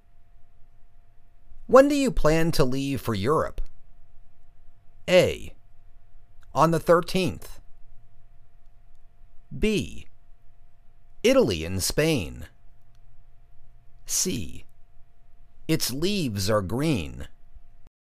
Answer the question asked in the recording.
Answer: On the 13th